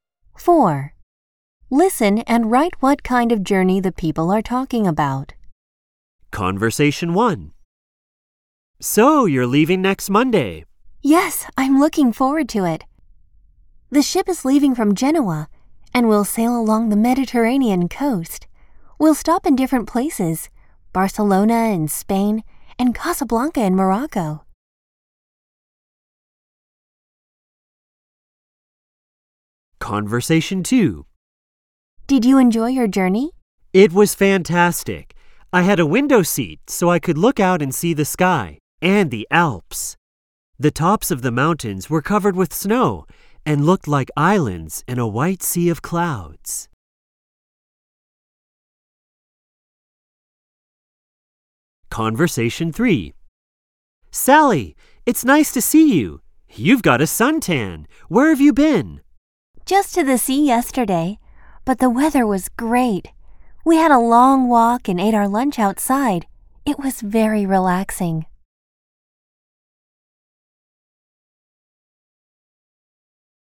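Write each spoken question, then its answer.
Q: Listen and write what kind of journey the people are talking about.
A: a cruise

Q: Listen and write what kind of journey the people are talking about.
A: a flight (by plane)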